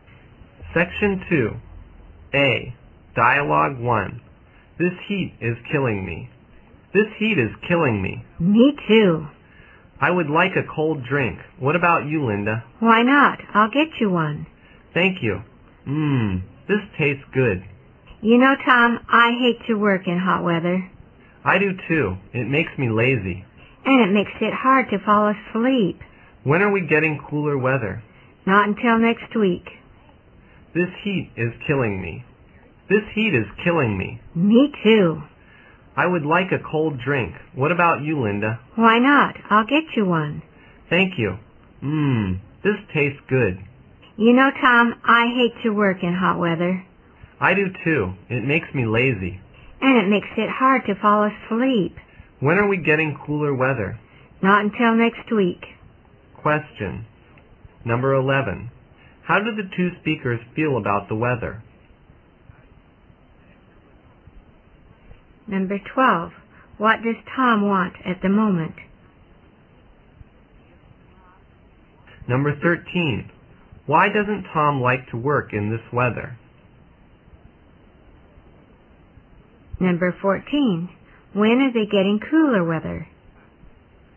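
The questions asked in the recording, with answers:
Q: How do the two speakers feel about the weather?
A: They both find it too hot

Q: Why doesn't Tom like to work in this weather?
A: It makes him lazy

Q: When are they getting cooler weather?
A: Not until next week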